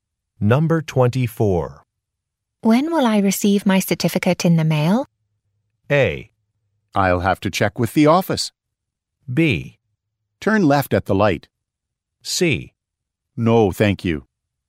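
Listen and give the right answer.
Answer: A: I'll have to check with the office.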